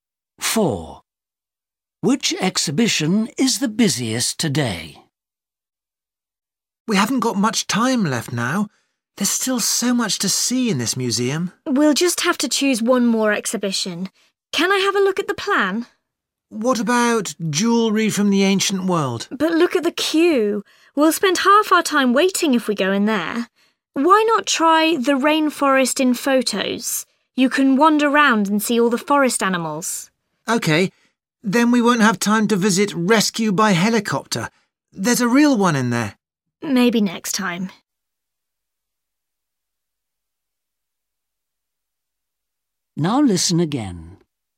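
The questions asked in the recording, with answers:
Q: Which exhibition is the busiest today?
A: jewellery from the ancient world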